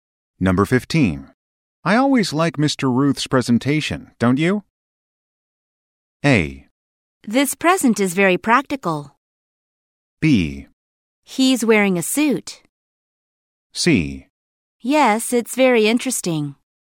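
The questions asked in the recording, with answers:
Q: Ruth's presentation, don't you?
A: C: Yes, it's very interesting.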